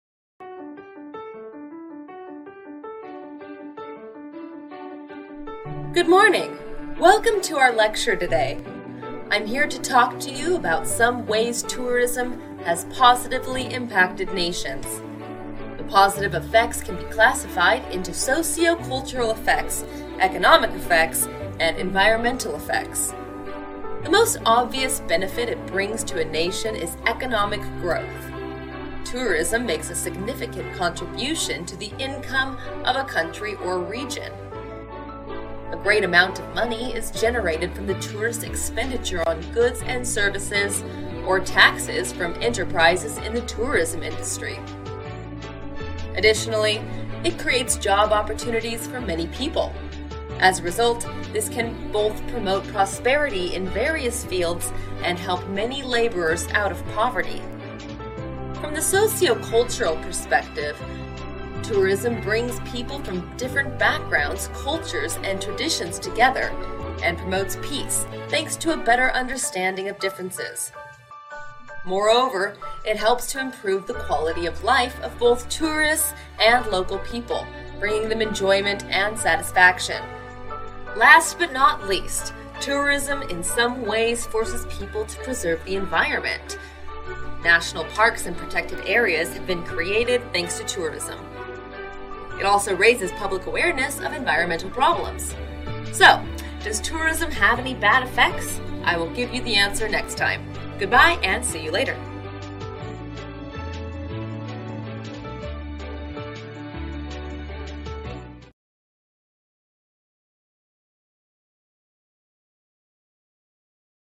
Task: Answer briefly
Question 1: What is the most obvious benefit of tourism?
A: Economic growth

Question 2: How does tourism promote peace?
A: By connecting cultures

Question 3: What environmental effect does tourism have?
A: Creates national parks

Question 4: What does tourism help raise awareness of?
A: Environmental problems

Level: lớp 9